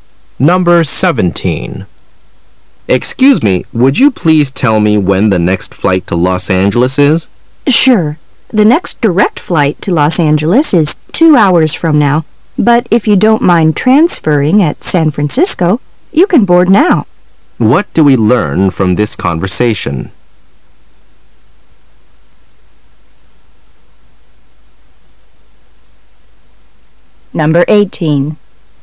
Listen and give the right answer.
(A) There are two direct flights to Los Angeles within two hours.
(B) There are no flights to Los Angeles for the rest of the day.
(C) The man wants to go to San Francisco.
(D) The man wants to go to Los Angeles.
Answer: (D) The man wants to go to Los Angeles.

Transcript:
[解析] M:Excuse me,would you please tell me when the next flight to Los Angeles is? W:Sure,the next direct flight to Los Angeles is two hours from now,but if you don't mind transferring at San Francisco, you can board now. Q:What do we learn from this conversation?